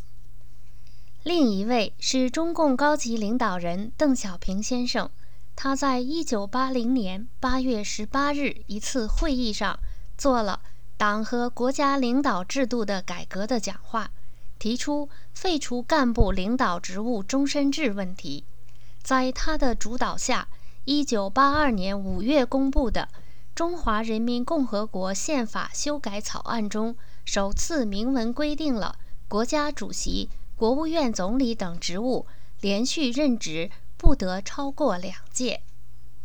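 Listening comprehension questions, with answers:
Please answer the following questions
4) According to the Chinese Constitution, what is the longest tenure of office for Chinese leaders?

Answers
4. Two consecutive terms

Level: M.Phil Year 2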